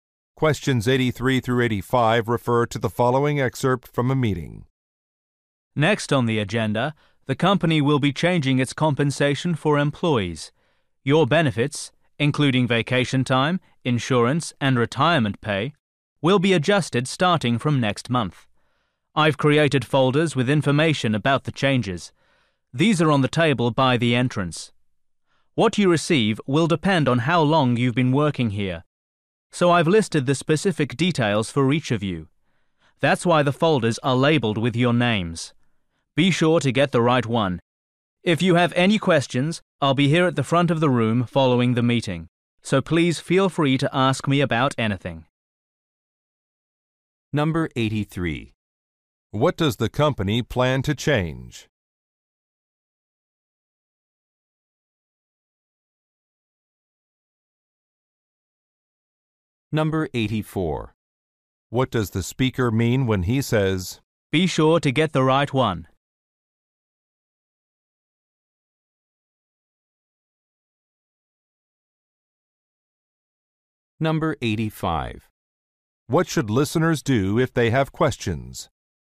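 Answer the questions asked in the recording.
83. Employee benefits/compensation
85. Talk to the speaker at the front of the room after the meeting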